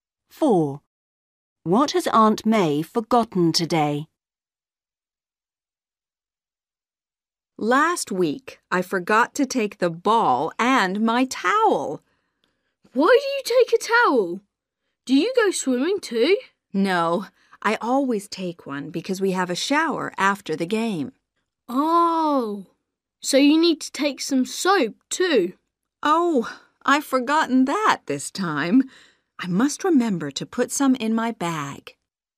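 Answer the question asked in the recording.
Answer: Soap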